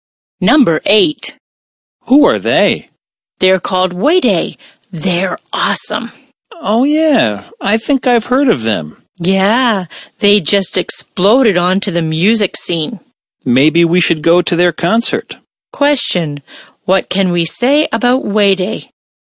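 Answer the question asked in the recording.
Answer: They are a band that recently became very popular.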